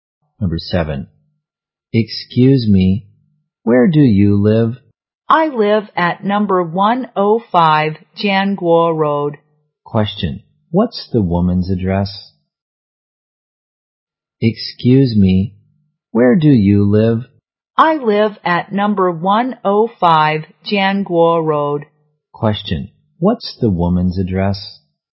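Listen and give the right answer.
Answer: No. 105 Jianguo Road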